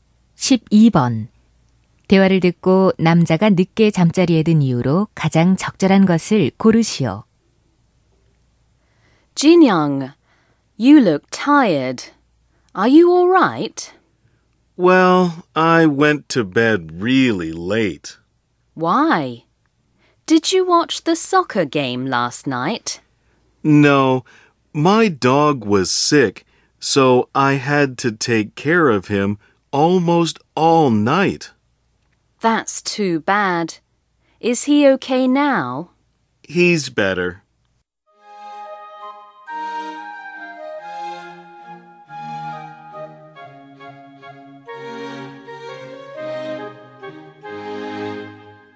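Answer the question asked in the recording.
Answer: 아픈 개를 돌봐야 해서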